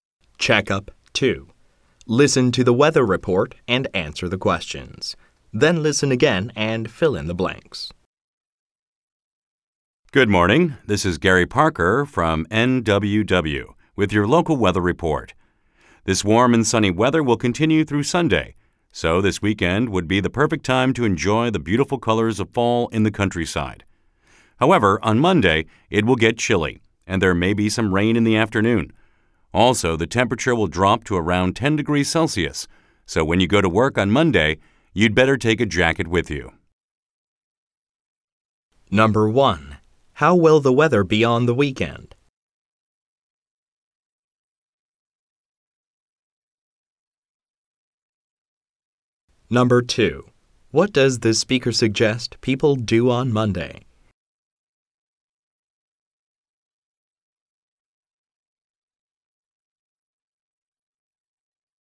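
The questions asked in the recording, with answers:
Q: How will the weather be on the weekend?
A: Warm and sunny

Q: What does the speaker suggest people do on Monday?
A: Take a jacket to work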